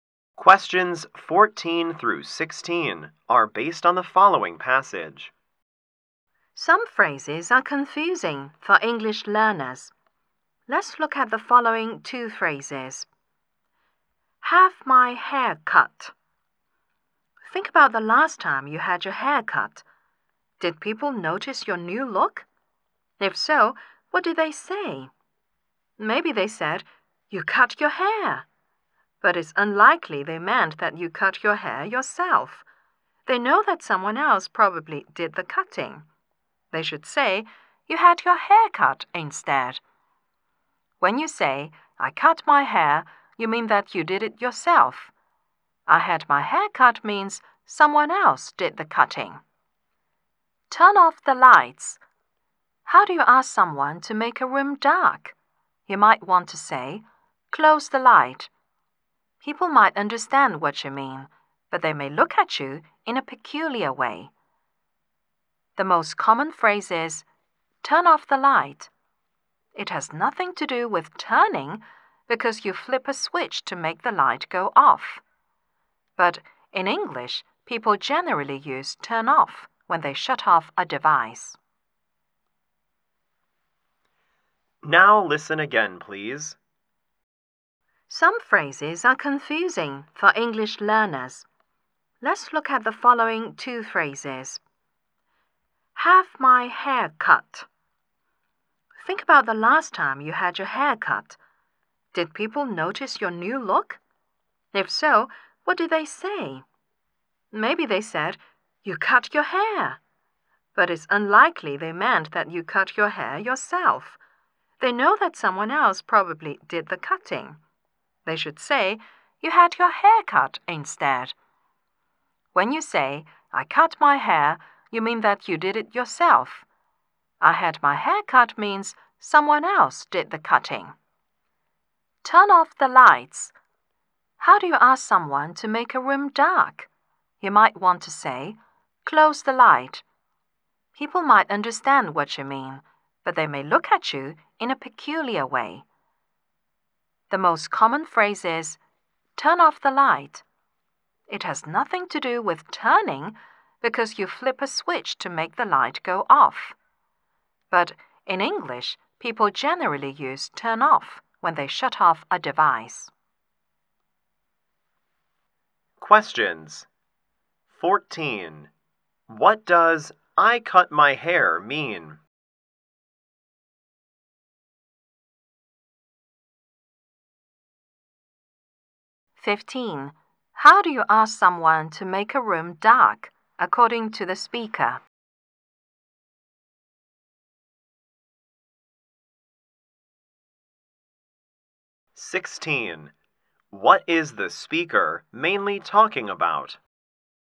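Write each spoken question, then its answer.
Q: What does I cut my hair mean?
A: You cut your hair yourself

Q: How do you ask someone to make a room dark, according to the speaker?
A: Say "turn off the light"

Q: What is the speaker mainly talking about?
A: English phrases that confuse learners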